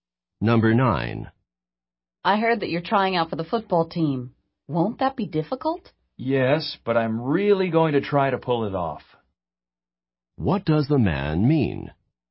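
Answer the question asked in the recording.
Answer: He will try hard to succeed in making the team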